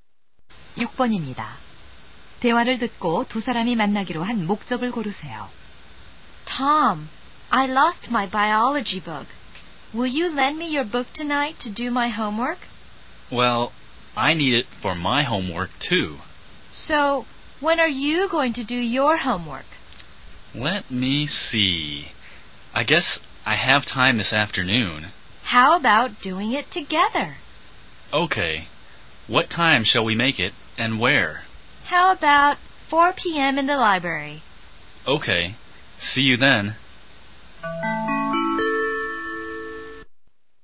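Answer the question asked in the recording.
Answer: 함께 생물 숙제를 하기 위해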